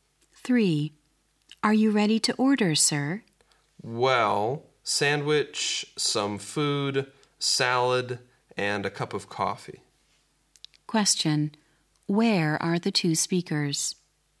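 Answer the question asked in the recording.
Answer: In a restaurant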